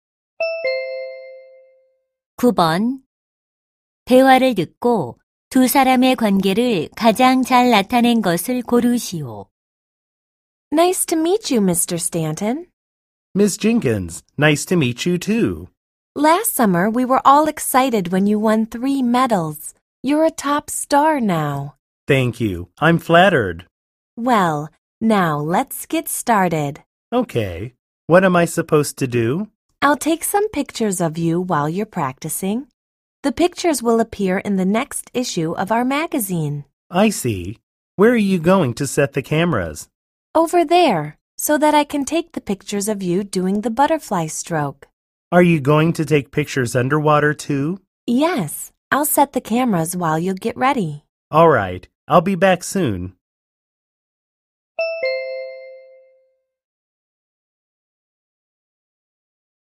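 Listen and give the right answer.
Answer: 사진작가 - 수영 선수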